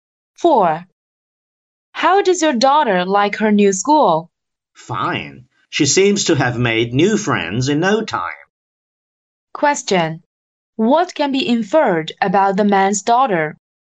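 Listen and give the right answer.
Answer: She has quickly adapted to the new school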